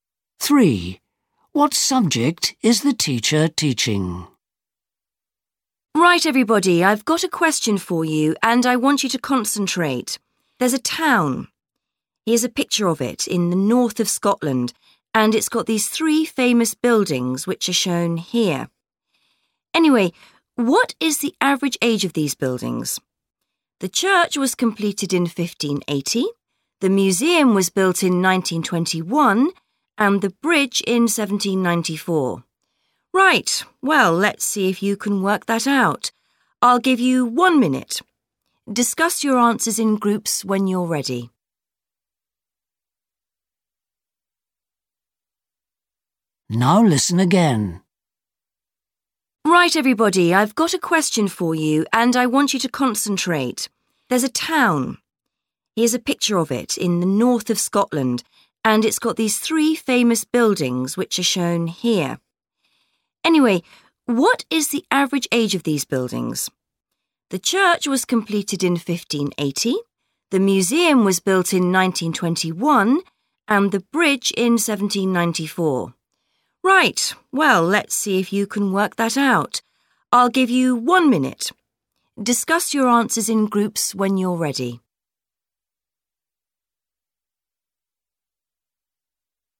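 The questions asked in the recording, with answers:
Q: What subject is the teacher teaching?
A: Maths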